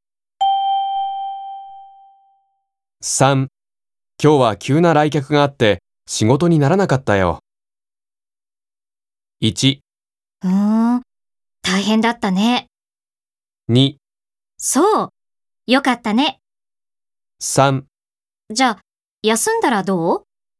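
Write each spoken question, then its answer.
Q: 今日は急な来客があって仕事にならなかったよ。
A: 1: 大変だったね。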